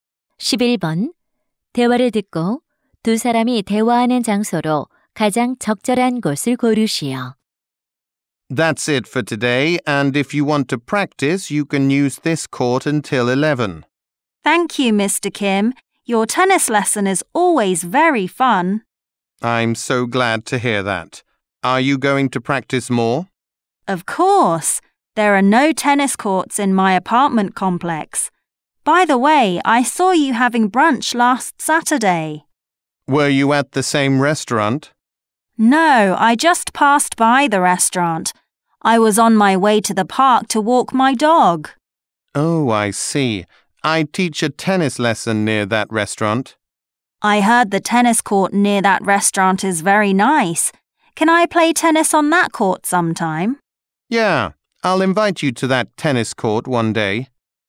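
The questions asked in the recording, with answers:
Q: 대화를 듣고 두 사람이 대화하는 장소로 가장 적절한 곳을 고르시오.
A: 테니스장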